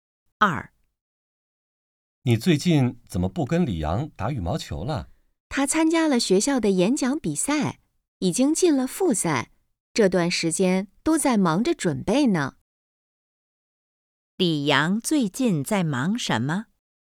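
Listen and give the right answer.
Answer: 准备演讲比赛复赛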